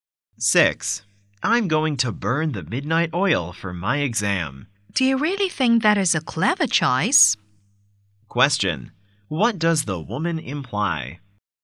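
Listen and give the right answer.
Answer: Staying up late to study is not a wise choice.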